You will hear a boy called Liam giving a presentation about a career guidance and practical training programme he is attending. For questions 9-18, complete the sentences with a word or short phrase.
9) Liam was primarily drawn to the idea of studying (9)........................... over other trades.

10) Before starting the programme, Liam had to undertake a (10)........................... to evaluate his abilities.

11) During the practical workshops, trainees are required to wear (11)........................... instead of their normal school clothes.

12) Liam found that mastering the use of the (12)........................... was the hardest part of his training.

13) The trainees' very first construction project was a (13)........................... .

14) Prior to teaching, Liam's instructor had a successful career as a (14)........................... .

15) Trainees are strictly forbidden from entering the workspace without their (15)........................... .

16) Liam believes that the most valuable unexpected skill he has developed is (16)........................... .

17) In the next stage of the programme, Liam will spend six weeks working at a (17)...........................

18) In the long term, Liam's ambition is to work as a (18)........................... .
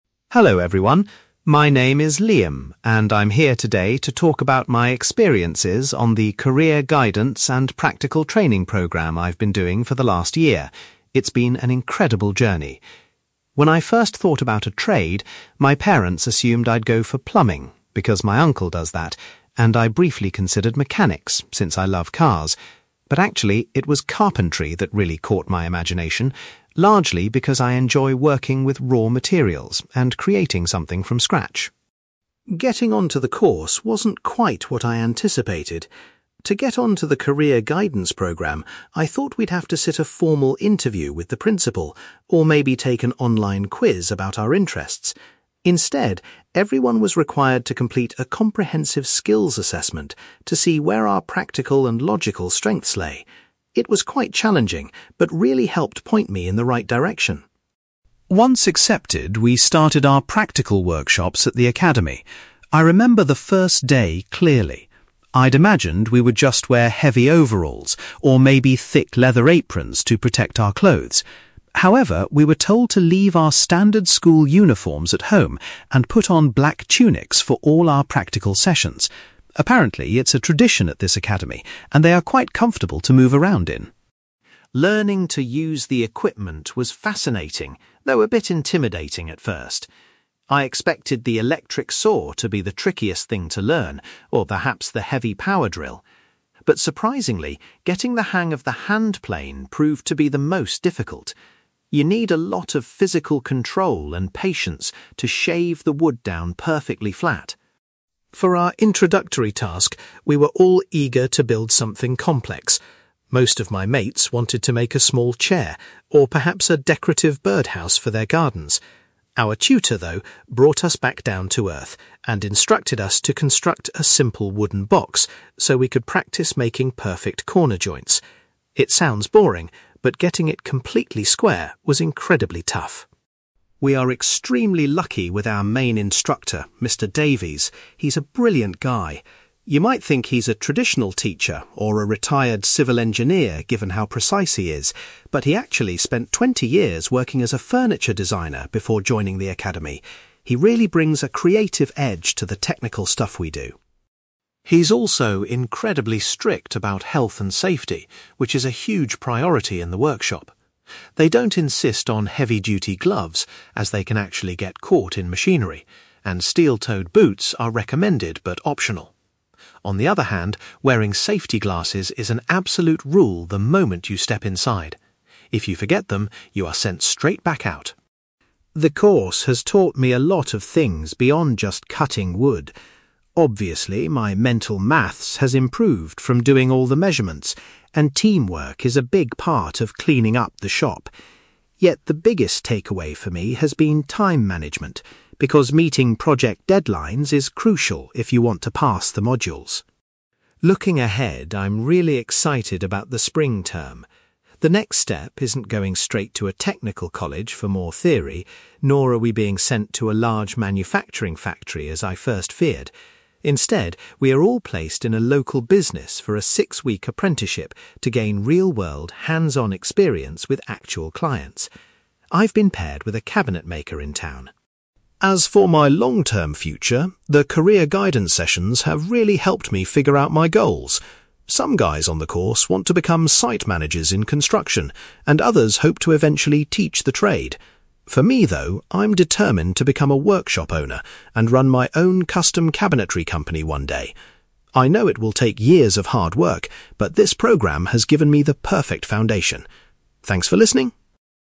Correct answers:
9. carpentry
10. skills assessment
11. black tunics
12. hand plane
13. wooden box
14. furniture designer
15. safety glasses
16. time management
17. local business
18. workshop owner

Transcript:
Liam: Hello everyone. My name is Liam, and I'm here today to talk about my experiences on the career guidance and practical training programme I've been doing for the last year. It's been an incredible journey. When I first thought about a trade, my parents assumed I'd go for plumbing, because my uncle does that, and I briefly considered mechanics since I love cars. But actually, it was carpentry that really caught my imagination, largely because I enjoy working with raw materials and creating something from scratch.
Getting onto the course wasn't quite what I anticipated. To get onto the career guidance programme, I thought we'd have to sit a formal interview with the principal, or maybe take an online quiz about our interests. Instead, everyone was required to complete a comprehensive skills assessment to see where our practical and logical strengths lay. It was quite challenging but really helped point me in the right direction.
Once accepted, we started our practical workshops at the academy. I remember the first day clearly. I'd imagined we would just wear heavy overalls, or maybe thick leather aprons to protect our clothes. However, we were told to leave our standard school uniforms at home and put on black tunics for all our practical sessions. Apparently, it's a tradition at this academy, and they are quite comfortable to move around in.
Learning to use the equipment was fascinating, though a bit intimidating at first. I expected the electric saw to be the trickiest thing to learn, or perhaps the heavy power drill. But surprisingly, getting the hang of the hand plane proved to be the most difficult. You need a lot of physical control and patience to shave the wood down perfectly flat.
For our introductory task, we were all eager to build something complex. Most of my mates wanted to make a small chair, or perhaps a decorative birdhouse for their gardens. Our tutor, though, brought us back down to earth and instructed us to construct a simple wooden box so we could practice making perfect corner joints. It sounds boring, but getting it completely square was incredibly tough.
We are extremely lucky with our main instructor, Mr. Davies. He's a brilliant guy. You might think he's a traditional teacher, or a retired civil engineer given how precise he is, but he actually spent twenty years working as a furniture designer before joining the academy. He really brings a creative edge to the technical stuff we do.
He's also incredibly strict about health and safety, which is a huge priority in the workshop. They don't insist on heavy-duty gloves, as they can actually get caught in machinery, and steel-toed boots are recommended but optional. On the other hand, wearing safety glasses is an absolute rule the moment you step inside. If you forget them, you are sent straight back out.
The course has taught me a lot of things beyond just cutting wood. Obviously, my mental maths has improved from doing all the measurements, and teamwork is a big part of cleaning up the shop. Yet, the biggest takeaway for me has been time management, because meeting project deadlines is crucial if you want to pass the modules.
Looking ahead, I'm really excited about the spring term. The next step isn't going straight to a technical college for more theory, nor are we being sent to a large manufacturing factory as I first feared. Instead, we are all placed in a local business for a six-week apprenticeship to gain real-world, hands-on experience with actual clients. I've been paired with a cabinet maker in town.
As for my long-term future, the career guidance sessions have really helped me figure out my goals. Some guys on the course want to become site managers in construction, and others hope to eventually teach the trade. For me, though, I'm determined to become a workshop owner and run my own custom cabinetry company one day. I know it will take years of hard work, but this programme has given me the perfect foundation. Thanks for listening!

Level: B2